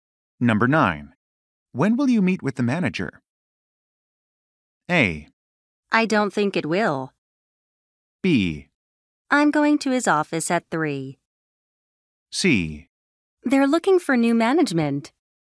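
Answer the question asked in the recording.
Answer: B: I'm going to his office at 3.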